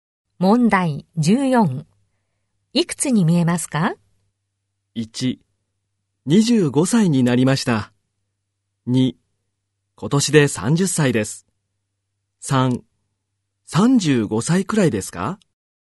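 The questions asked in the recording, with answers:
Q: いくつに見えますか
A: 3: 35歳くらいですか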